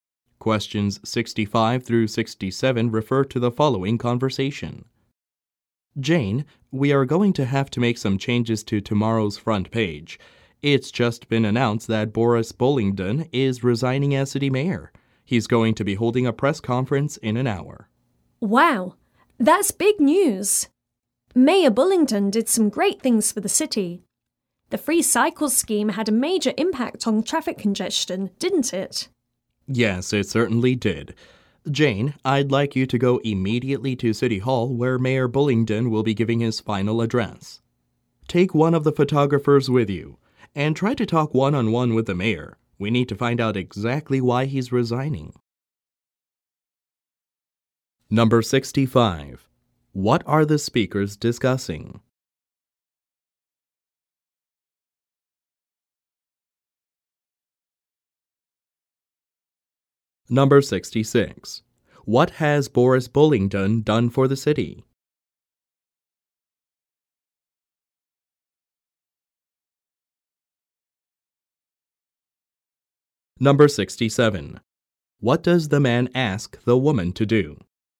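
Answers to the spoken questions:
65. The mayor's resignation
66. Reduced traffic congestion with a free cycle scheme
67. Go to City Hall and talk with the mayor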